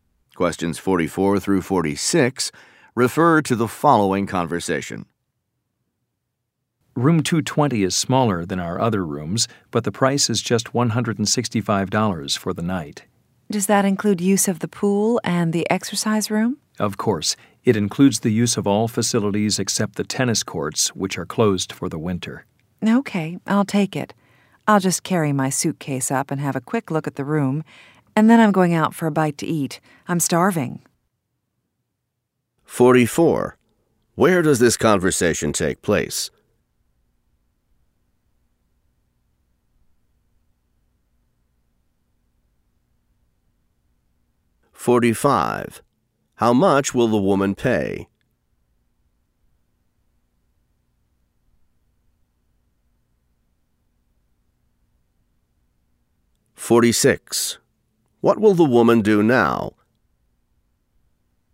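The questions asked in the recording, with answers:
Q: Where does this conversation take place?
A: At a hotel

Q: How much will the woman pay?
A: $165

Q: What will the woman do now?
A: Carry her suitcase up and look at the room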